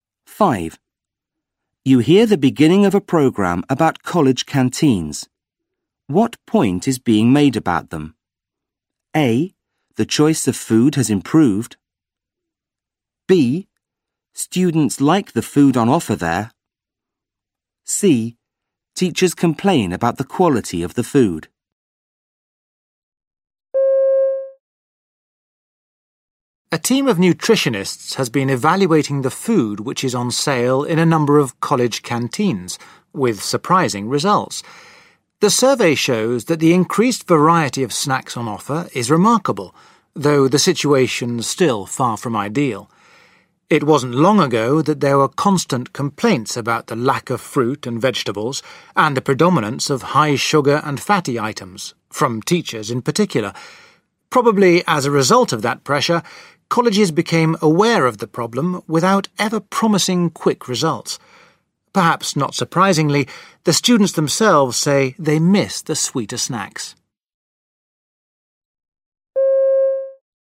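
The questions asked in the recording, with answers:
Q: What point is being made about them?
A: A: The choice of food has improved.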